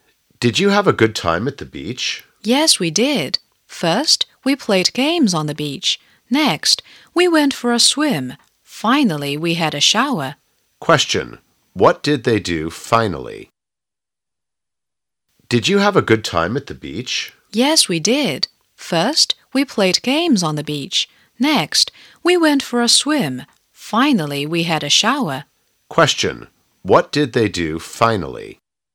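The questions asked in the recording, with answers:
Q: What did they do finally?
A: They had a shower.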